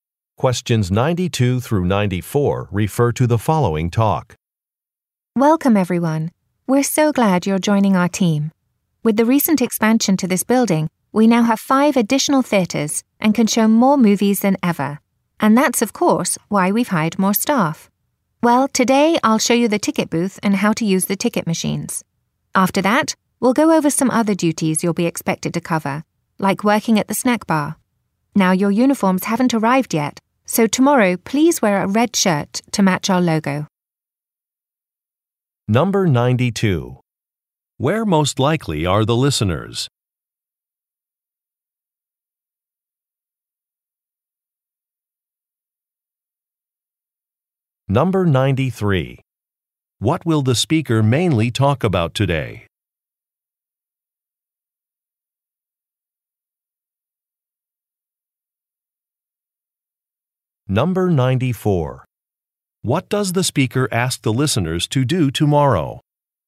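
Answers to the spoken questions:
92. At a movie theater
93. How to use the ticket booth and ticket machines
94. Wear a red shirt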